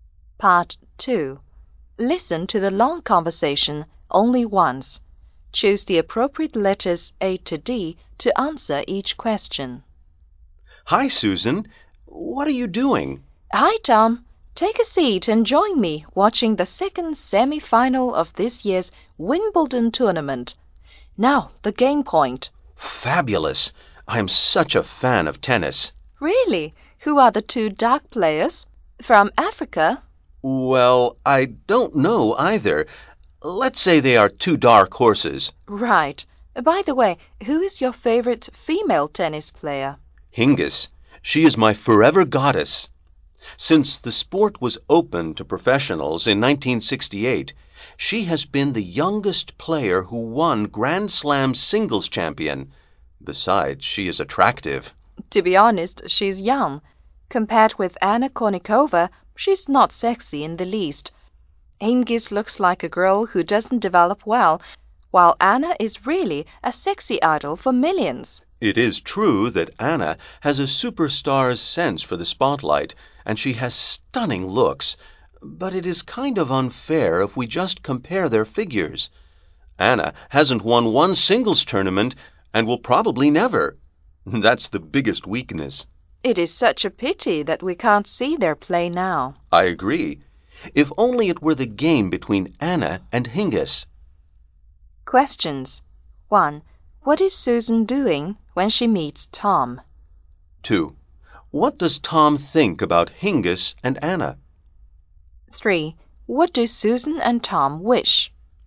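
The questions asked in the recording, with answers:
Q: What is Susan doing when she meets Tom?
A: Watching the second semi-final of Wimbledon on TV

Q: What does Tom think about Hingis and Anna?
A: Hingis is not sexy at all, while Anna is a sexy idol

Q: What do Susan and Tom wish?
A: To see a game between Anna and Hingis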